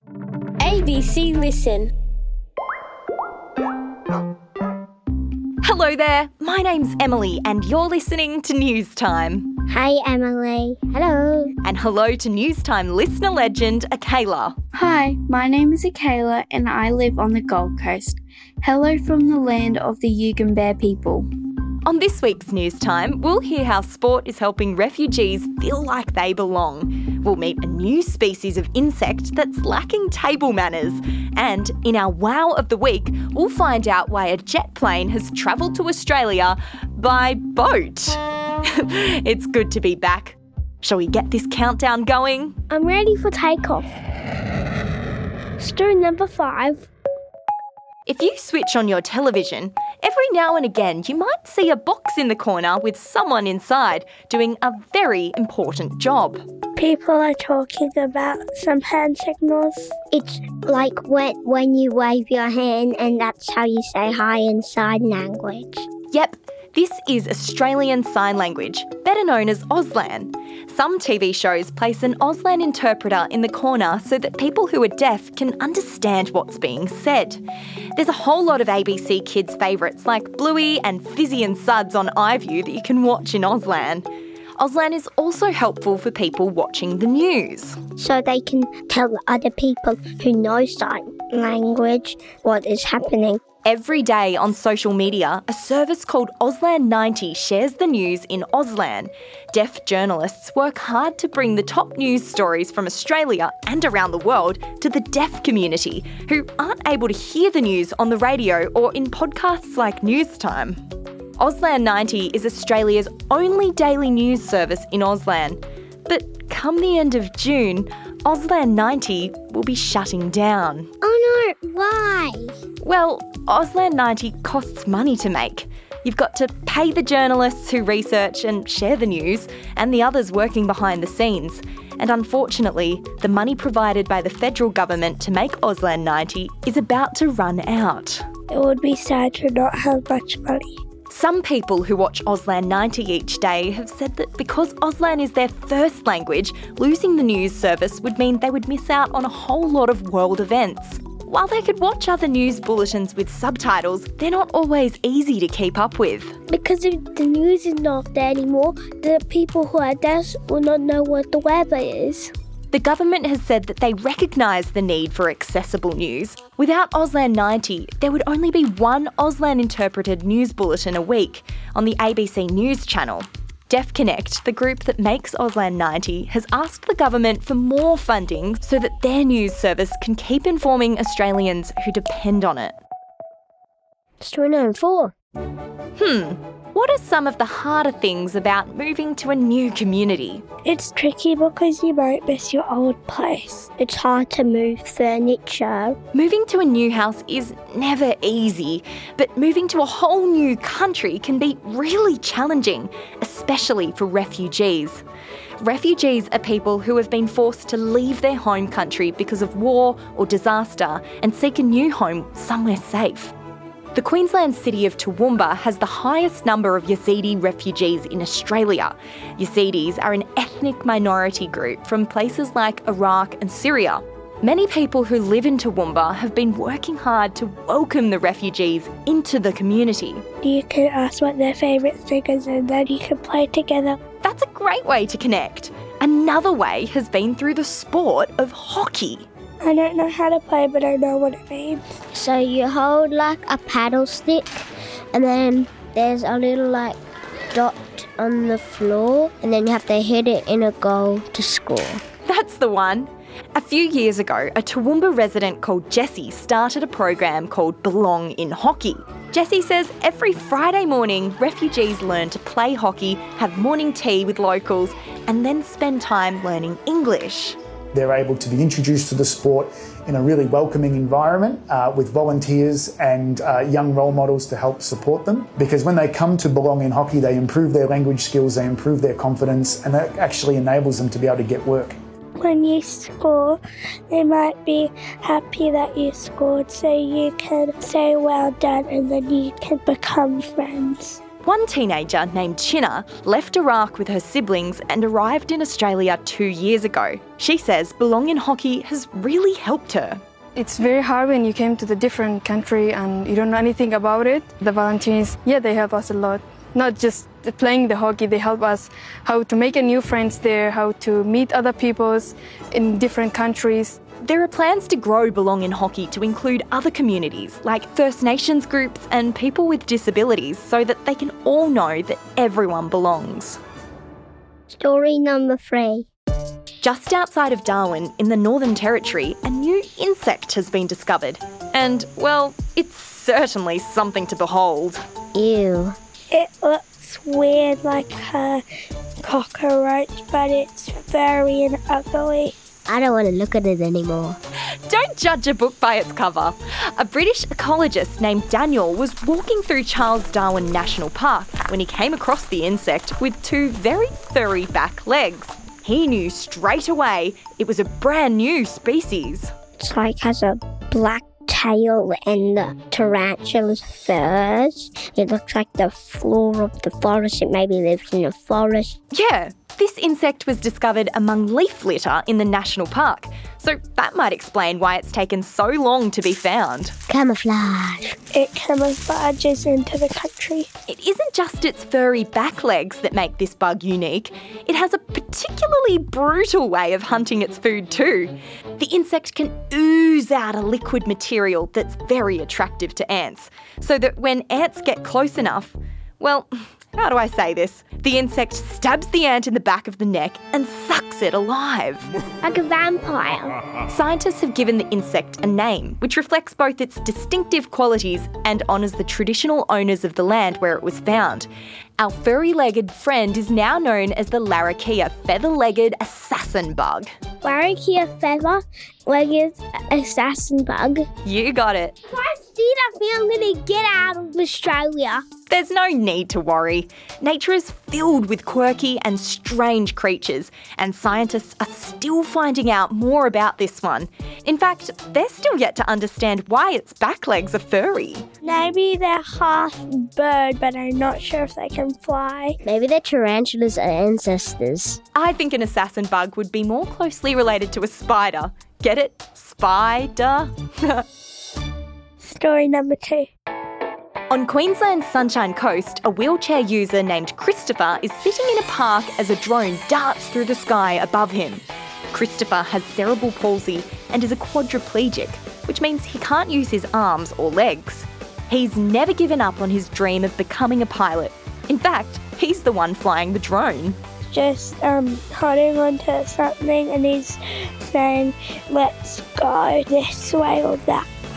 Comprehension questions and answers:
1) What is the name given to Australian sign language?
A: Auslan